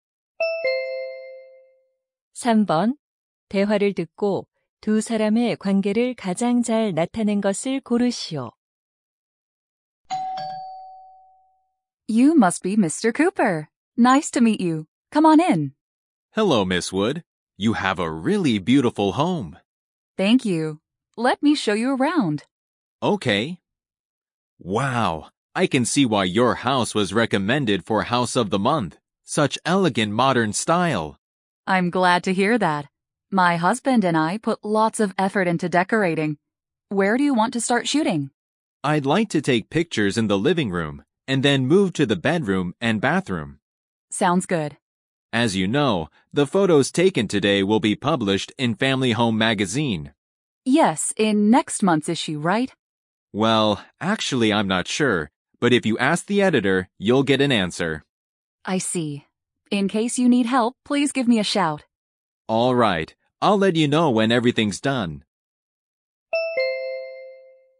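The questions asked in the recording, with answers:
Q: 대화를 듣고 두 사람의 관계를 가장 잘 나타낸 것을 고르시오.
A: 사진작가 – 집주인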